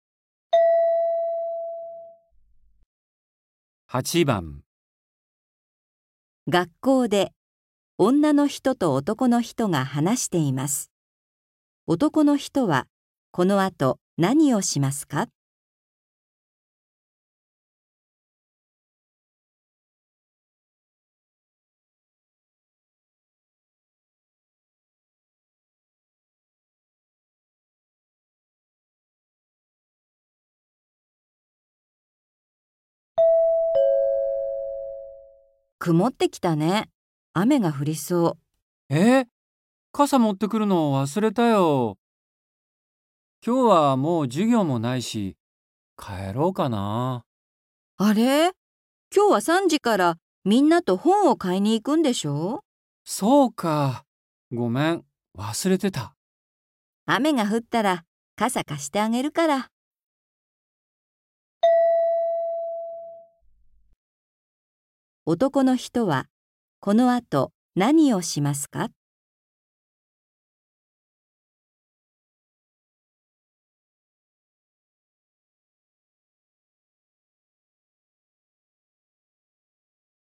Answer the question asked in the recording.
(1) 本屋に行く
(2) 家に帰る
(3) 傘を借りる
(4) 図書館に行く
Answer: (1) 本屋に行く

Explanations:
F:あれ?今日は3時からみんなと本を買いに行くんでしょう?

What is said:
F:くもってきたね。雨が降りそう。
M:え!傘持ってくるの、忘れたよ。今日はもう授業もないし、帰ろうかな。
F:あれ?今日は3時からみんなと本を買いに行くんでしょう?

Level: 初級